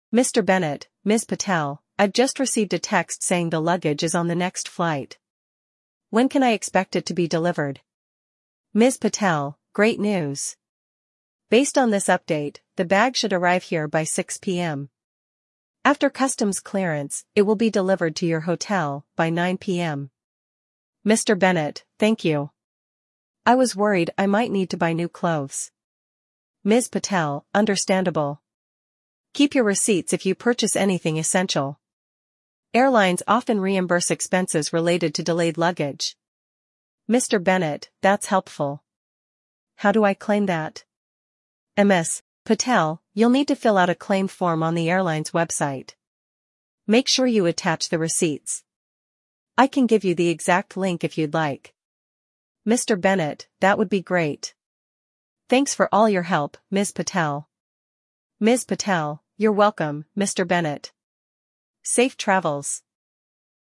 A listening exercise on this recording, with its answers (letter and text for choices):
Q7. When is Mr. Bennett's luggage expected to arrive at the hotel?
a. 6 PM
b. 9 PM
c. The next morning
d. Immediately after customs clearance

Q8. What advice does Ms. Patel give regarding new purchases?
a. Avoid buying anything new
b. Save the receipts for reimbursement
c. Request reimbursement directly at the counter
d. Wait until the bag arrives before buying anything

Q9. How can Mr. Bennett claim reimbursement for essential purchases?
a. By emailing the airport authority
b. By submitting a claim form on the airline's website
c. By contacting the hotel management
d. By speaking to the customs department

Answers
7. b. 9 PM
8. b. Save the receipts for reimbursement
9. b. By submitting a claim form on the airline's website

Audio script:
Mr. Bennett: Ms. Patel, I've just received a text saying the luggage is on the next flight. When can I expect it to be delivered?
Ms. Patel: Great news! Based on this update, the bag should arrive here by 6 PM. After customs clearance, it will be delivered to your hotel by 9 PM.
Mr. Bennett: Thank you. I was worried I might need to buy new clothes.
Ms. Patel: Understandable. Keep your receipts if you purchase anything essential. Airlines often reimburse expenses related to delayed luggage.
Mr. Bennett: That's helpful. How do I claim that?
Ms. Patel: You'll need to fill out a claim form on the airline's website. Make sure you attach the receipts. I can give you the exact link if you'd like.
Mr. Bennett: That would be great. Thanks for all your help, Ms. Patel.
Ms. Patel: You're welcome, Mr. Bennett. Safe travels!